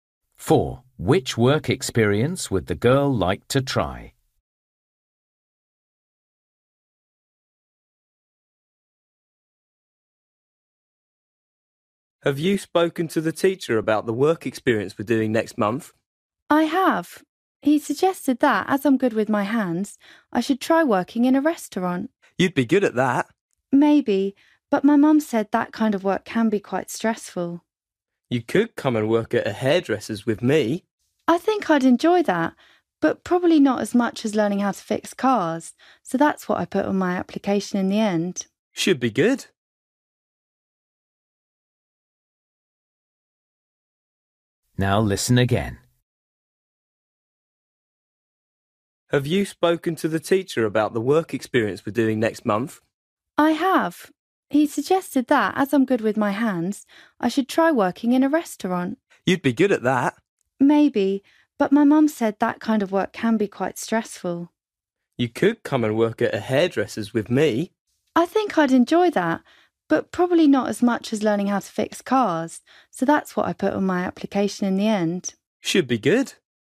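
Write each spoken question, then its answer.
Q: Which work experience would the girl like to try?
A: Fixing cars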